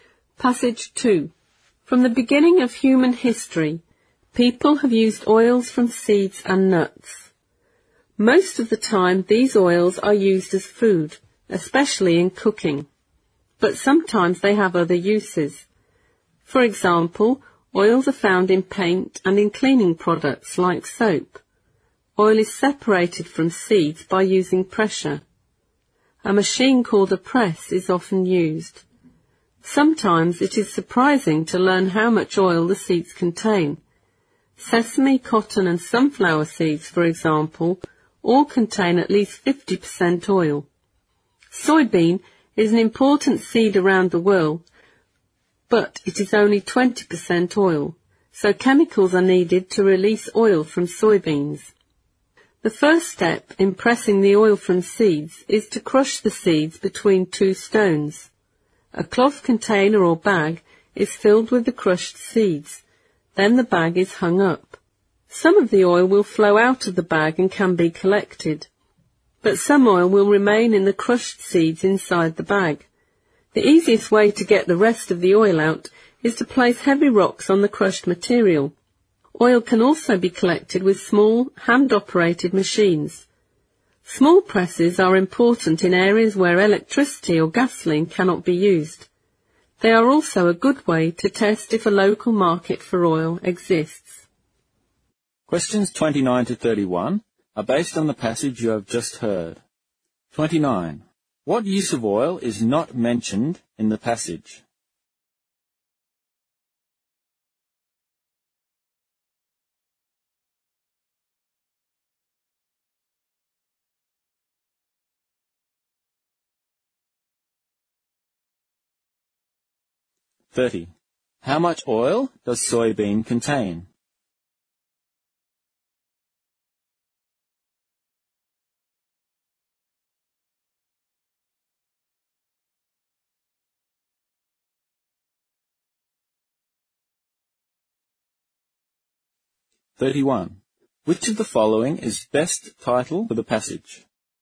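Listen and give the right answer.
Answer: Only 20%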